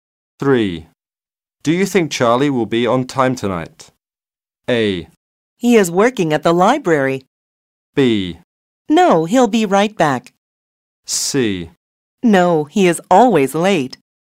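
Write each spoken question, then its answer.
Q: Do you think Charlie will be on time tonight?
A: C: No, he is always late.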